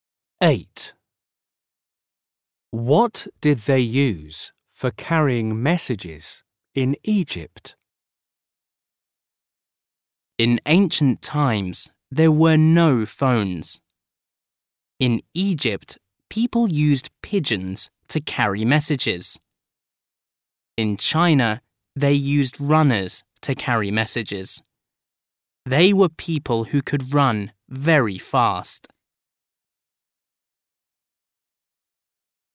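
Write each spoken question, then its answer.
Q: What did they use for carrying messages in Egypt?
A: pigeons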